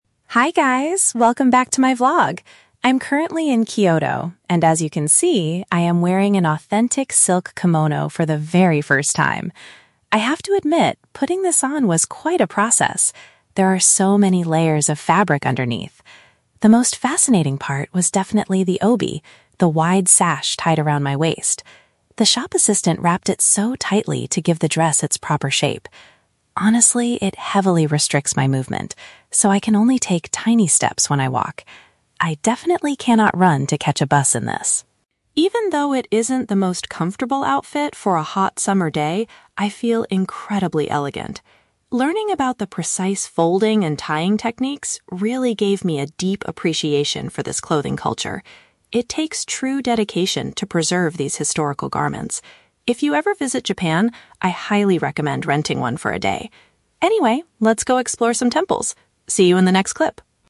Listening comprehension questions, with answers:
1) Why is the vlogger unable to walk normally?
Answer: The wide belt is wrapped very firmly around her stomach.

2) How does the vlogger feel about the traditional outfit overall?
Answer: She feels very graceful despite the physical discomfort.

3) What does the vlogger realize from this cultural experience?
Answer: She develops a strong respect for the preservation of this tradition.

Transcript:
Vlogger: Hi guys, welcome back to my vlog! I'm currently in Kyoto, and as you can see, I am wearing an authentic silk kimono for the very first time. I have to admit, putting this on was quite a process. There are so many layers of fabric underneath! The most fascinating part was definitely the obi, the wide sash tied around my waist. The shop assistant wrapped it so tightly to give the dress its proper shape. Honestly, it heavily restricts my movement, so I can only take tiny steps when I walk. I definitely cannot run to catch a bus in this!
Even though it isn't the most comfortable outfit for a hot summer day, I feel incredibly elegant. Learning about the precise folding and tying techniques really gave me a deep appreciation for this clothing culture. It takes true dedication to preserve these historical garments. If you ever visit Japan, I highly recommend renting one for a day. Anyway, let's go explore some temples. See you in the next clip!